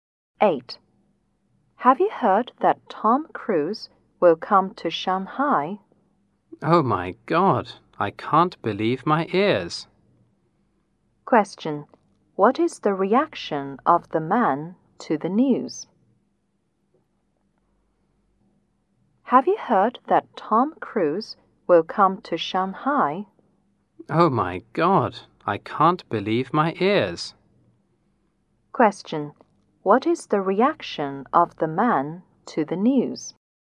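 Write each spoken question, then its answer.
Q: What is the reaction of the man to the news?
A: He is surprised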